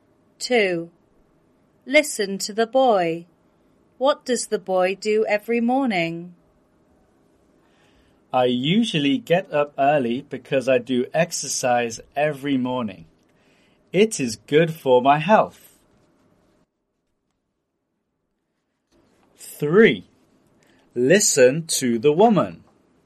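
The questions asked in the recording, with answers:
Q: What does the boy do every morning?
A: He does exercise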